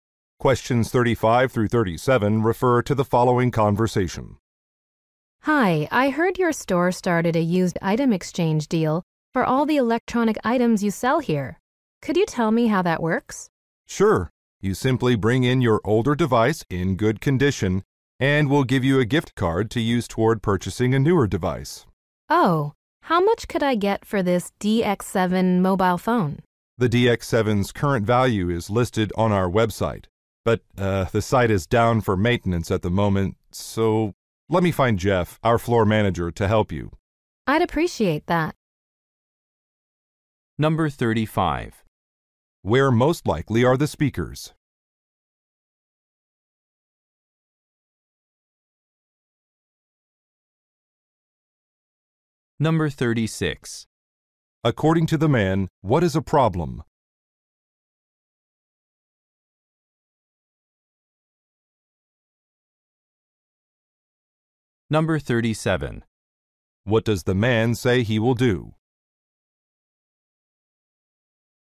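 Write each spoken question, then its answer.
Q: Where most likely are the speakers?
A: At an electronics store.

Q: According to the man, what is a problem?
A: The website is down for maintenance.

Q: What does the man say he will do?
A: Find the floor manager, Jeff.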